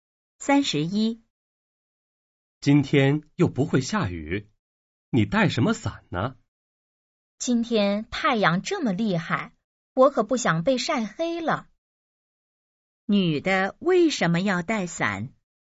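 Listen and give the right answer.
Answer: 怕被太阳晒黑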